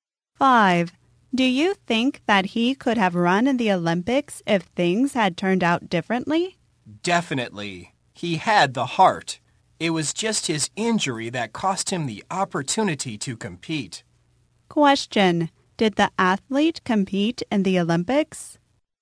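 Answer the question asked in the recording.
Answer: No, an injury cost him the opportunity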